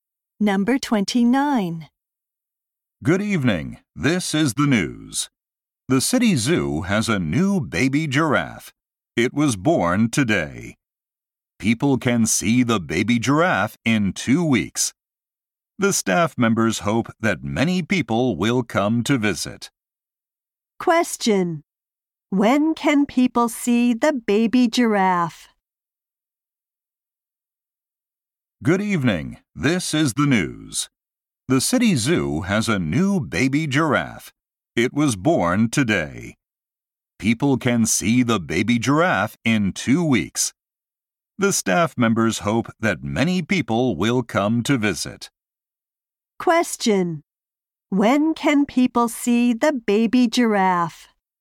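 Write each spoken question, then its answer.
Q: When can people see the baby giraffe?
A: In two weeks.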